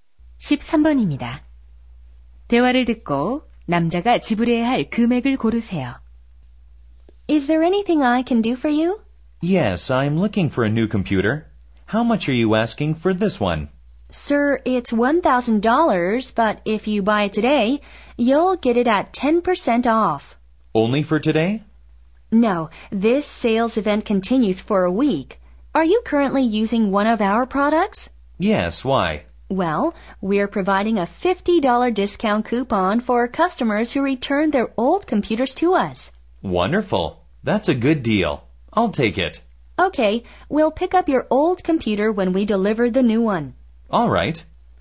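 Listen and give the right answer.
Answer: 850달러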